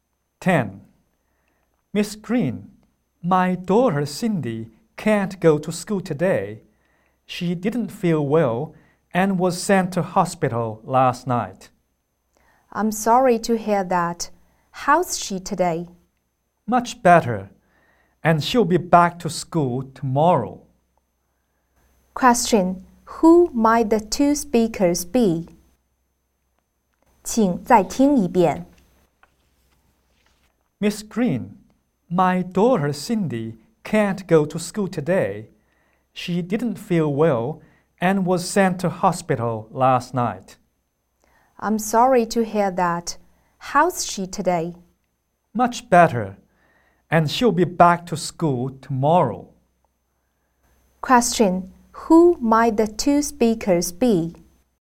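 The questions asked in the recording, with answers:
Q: Who might the two speakers be?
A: A teacher and a parent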